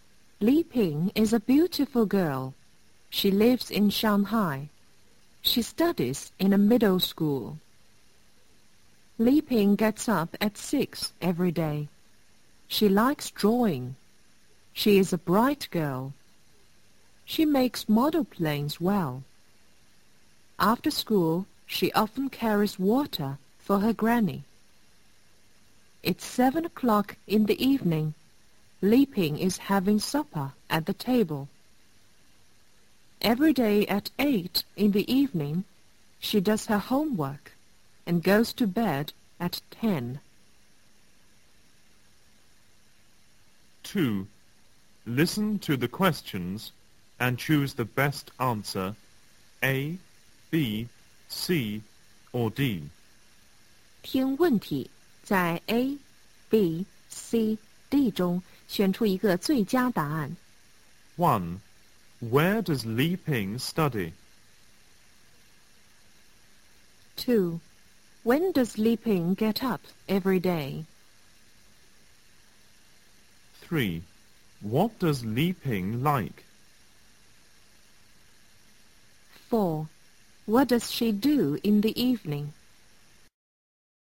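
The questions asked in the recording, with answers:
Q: Where does Li Ping study?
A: In a middle school in Shanghai

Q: When does Li Ping get up every day?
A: At 6

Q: What does Li Ping like?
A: Drawing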